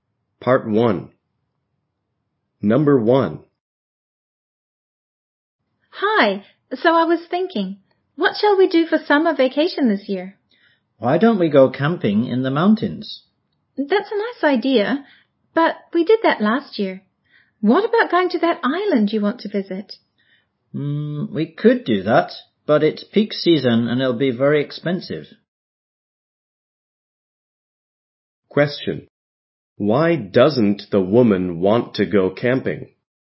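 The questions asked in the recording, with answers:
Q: Why doesn't the woman want to go camping?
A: Because they went camping last year.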